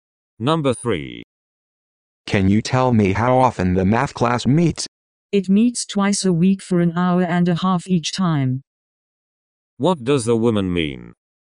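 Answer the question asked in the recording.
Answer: The class meets twice a week, an hour and a half each time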